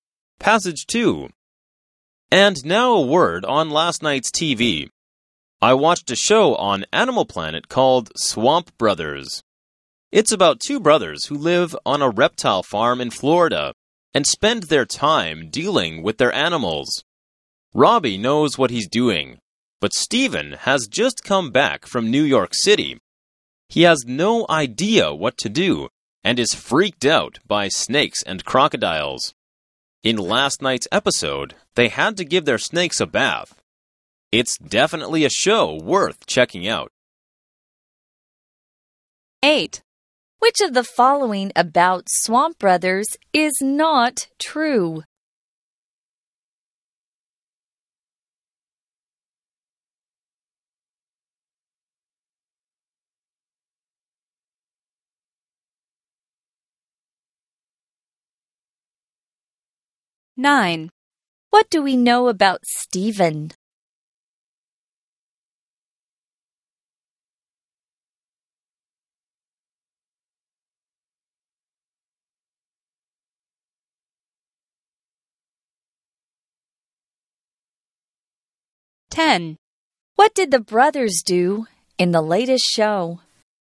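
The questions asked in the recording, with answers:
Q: What do we know about Steven?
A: He just came back from New York City and is freaked out by snakes and crocodiles

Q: What did the brothers do in the latest show?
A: They gave their snakes a bath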